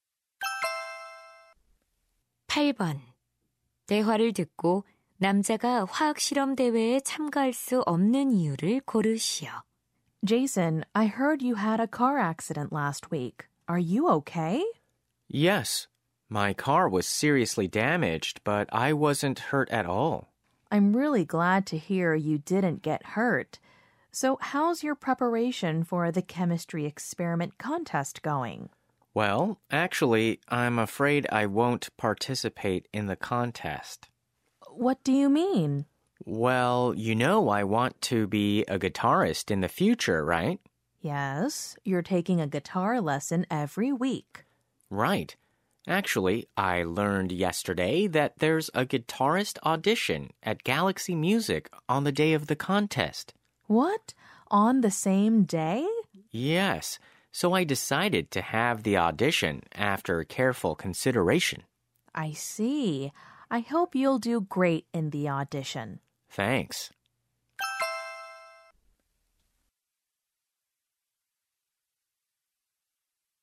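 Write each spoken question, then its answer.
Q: 대화를 듣고 남자가 화학 실험 대회에 참가할 수 없는 이유를 고르시오.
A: 같은 날 기타리스트 오디션이 있어서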